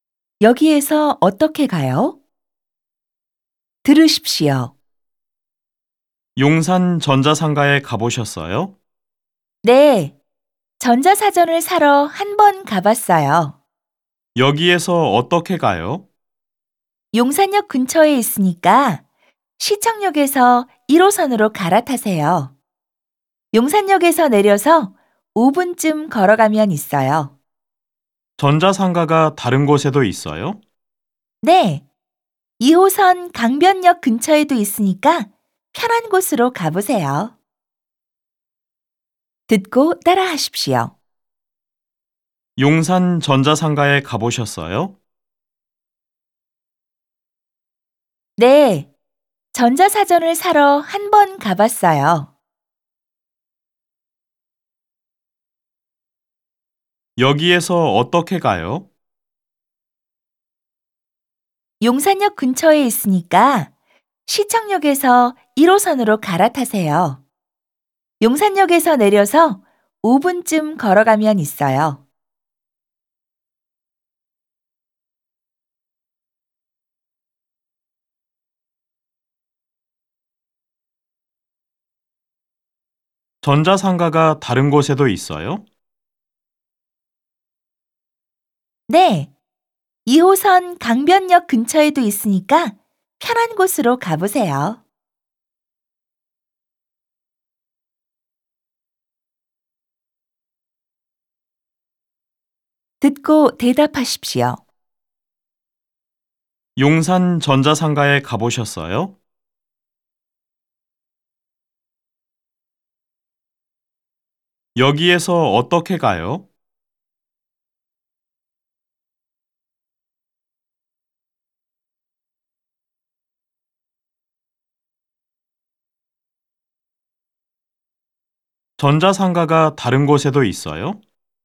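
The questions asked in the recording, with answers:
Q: 용산 전자상가에 가보셨어요?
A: 네, 전자사전을 사러 한번 가봤어요.

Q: 여기에서 어떻게 가요?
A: 시청역에서 1호선으로 갈아타고 용산역에서 내려서 5분쯤 걸어가면 있어요.

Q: 전자상가가 다른 곳에도 있어요?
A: 네, 2호선 강변역 근처에도 있어요.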